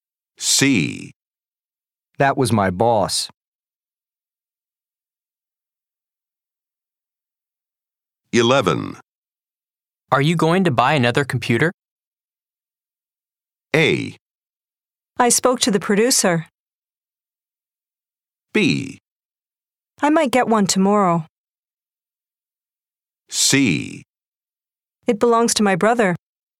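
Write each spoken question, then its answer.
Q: Are you going to buy another computer?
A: B: I might get one tomorrow.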